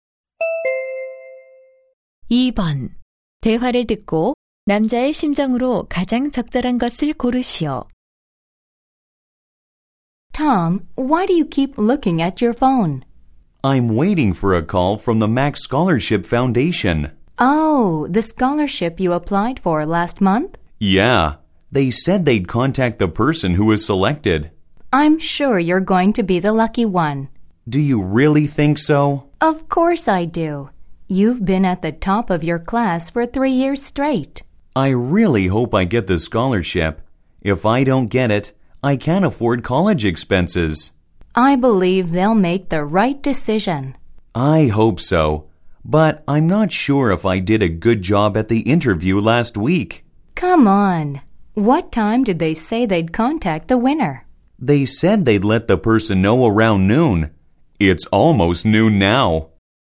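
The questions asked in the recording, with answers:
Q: 대화를 듣고 남자의 심정으로 가장 적절한 것을 고르시오.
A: 초조함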